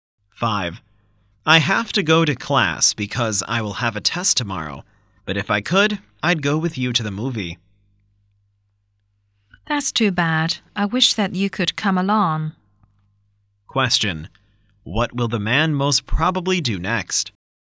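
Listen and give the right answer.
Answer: Go to class to prepare for a test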